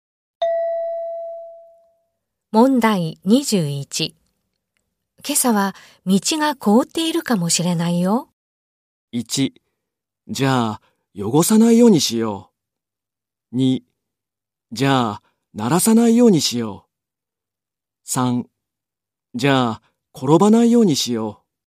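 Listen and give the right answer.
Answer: 3: じゃあ転ばないようにしよう。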